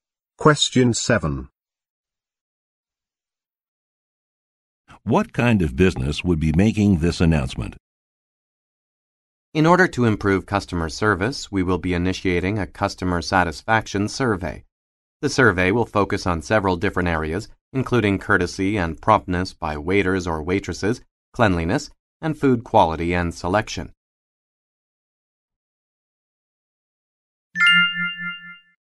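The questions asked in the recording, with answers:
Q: What kind of business would be making this announcement?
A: A restaurant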